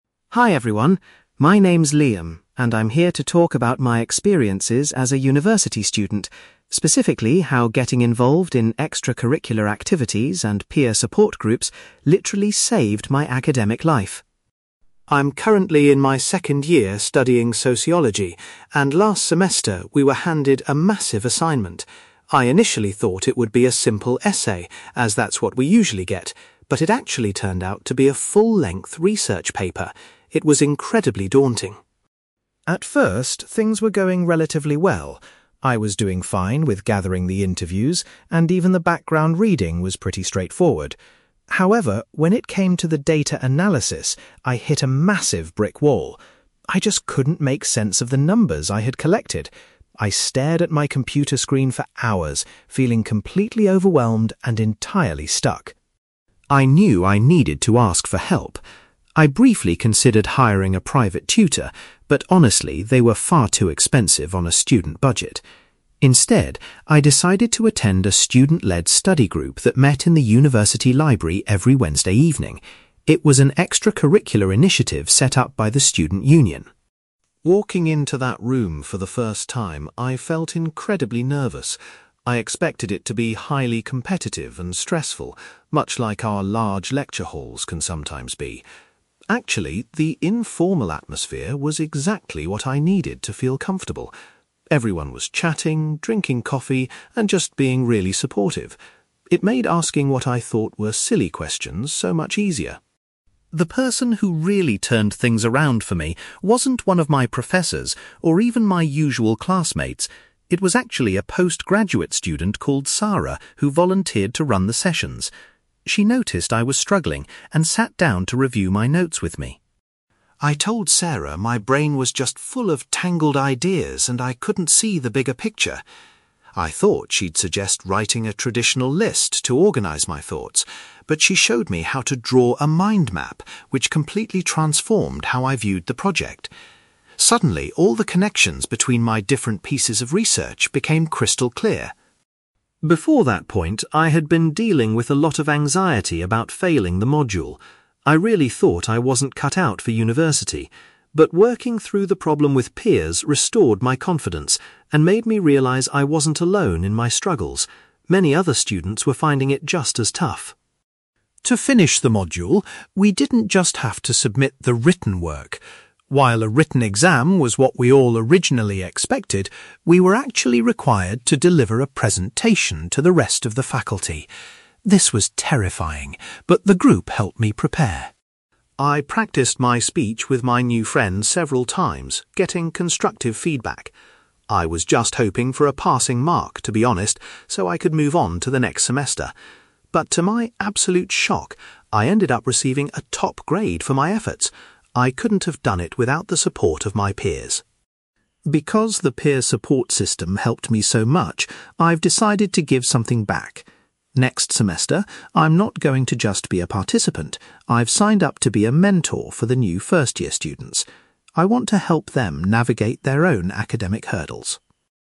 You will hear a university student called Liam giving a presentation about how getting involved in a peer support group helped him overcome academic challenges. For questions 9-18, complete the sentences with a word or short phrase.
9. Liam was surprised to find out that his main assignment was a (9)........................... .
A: research paper

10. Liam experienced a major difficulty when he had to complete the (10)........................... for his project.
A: data analysis

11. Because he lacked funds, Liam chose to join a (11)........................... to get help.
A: study group

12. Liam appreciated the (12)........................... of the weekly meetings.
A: informal atmosphere

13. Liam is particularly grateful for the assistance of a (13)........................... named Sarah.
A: postgraduate student

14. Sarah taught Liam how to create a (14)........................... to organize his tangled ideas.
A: mind map

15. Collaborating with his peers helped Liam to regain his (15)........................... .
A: confidence

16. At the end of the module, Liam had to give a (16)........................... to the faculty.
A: presentation

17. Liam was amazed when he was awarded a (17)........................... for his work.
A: top grade

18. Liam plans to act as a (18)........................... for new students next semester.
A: mentor

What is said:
Liam: Hi everyone, my name is Liam, and I'm here to talk about my experiences as a university student, specifically how getting involved in extracurricular activities and peer support groups literally saved my academic life!
I'm currently in my second year studying Sociology, and last semester, we were handed a massive assignment. I initially thought it would be a simple essay, as that's what we usually get, but it actually turned out to be a full-length research paper. It was incredibly daunting.
At first, things were going relatively well. I was doing fine with gathering the interviews, and even the background reading was pretty straightforward. However, when it came to the data analysis, I hit a massive brick wall. I just couldn't make sense of the numbers I had collected. I stared at my computer screen for hours, feeling completely overwhelmed and entirely stuck.
I knew I needed to ask for help. I briefly considered hiring a private tutor, but honestly, they were far too expensive on a student budget. Instead, I decided to attend a student-led study group that met in the university library every Wednesday evening. It was an extracurricular initiative set up by the student union.
Walking into that room for the first time, I felt incredibly nervous. I expected it to be highly competitive and stressful, much like our large lecture halls can sometimes be. Actually, the informal atmosphere was exactly what I needed to feel comfortable. Everyone was chatting, drinking coffee, and just being really supportive. It made asking what I thought were silly questions so much easier.
The person who really turned things around for me wasn't one of my professors, or even my usual classmates. It was actually a postgraduate student called Sarah who volunteered to run the sessions. She noticed I was struggling and sat down to review my notes with me.
I told Sarah my brain was just full of tangled ideas and I couldn't see the bigger picture. I thought she'd suggest writing a traditional list to organise my thoughts, but she showed me how to draw a mind map, which completely transformed how I viewed the project. Suddenly, all the connections between my different pieces of research became crystal clear.
Before that point, I had been dealing with a lot of anxiety about failing the module. I really thought I wasn't cut out for university. But working through the problem with peers restored my confidence and made me realise I wasn't alone in my struggles. Many other students were finding it just as tough.
To finish the module, we didn't just have to submit the written work. While a written exam was what we all originally expected, we were actually required to deliver a presentation to the rest of the faculty. This was terrifying, but the group helped me prepare.
I practised my speech with my new friends several times, getting constructive feedback. I was just hoping for a passing mark, to be honest, so I could move on to the next semester. But to my absolute shock, I ended up receiving a top grade for my efforts! I couldn't have done it without the support of my peers.
Because the peer support system helped me so much, I've decided to give something back. Next semester, I'm not going to just be a participant; I've signed up to be a mentor for the new first-year students. I want to help them navigate their own academic hurdles.

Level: B2